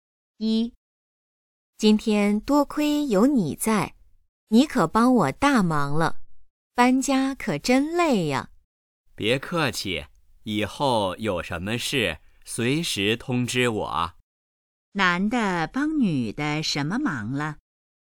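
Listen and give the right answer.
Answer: 帮她搬家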